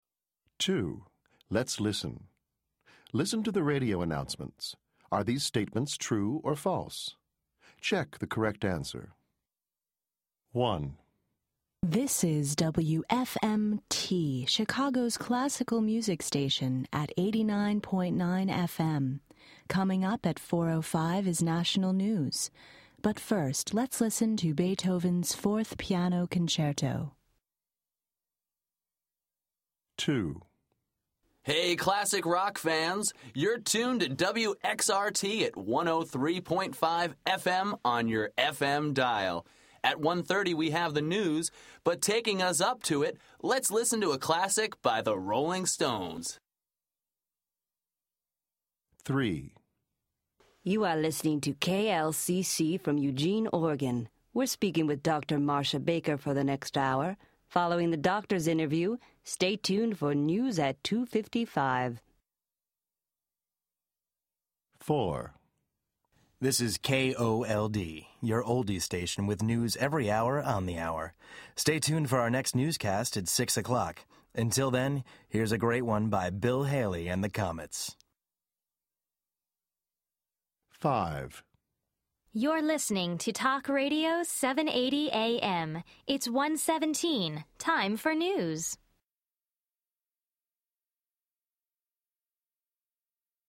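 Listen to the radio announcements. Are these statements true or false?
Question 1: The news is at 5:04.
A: False

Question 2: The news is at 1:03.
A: False

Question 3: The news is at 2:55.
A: True

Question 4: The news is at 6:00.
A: True

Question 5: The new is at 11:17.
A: False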